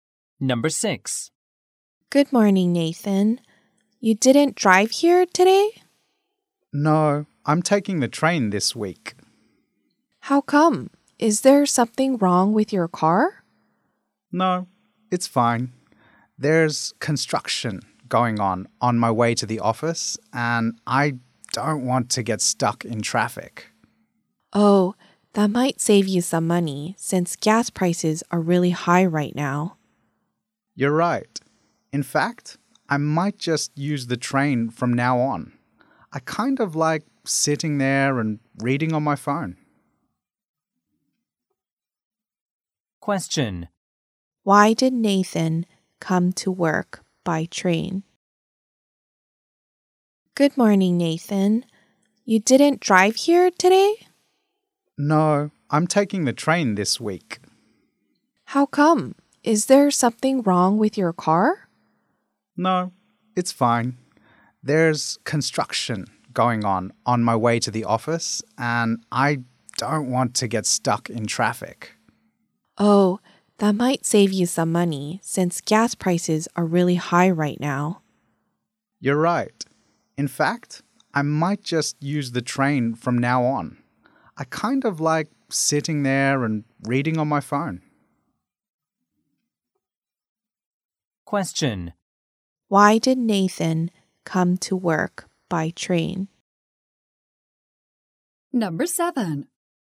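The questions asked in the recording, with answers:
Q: Why did Nathan come to work by train?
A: To avoid traffic caused by construction on his way to the office.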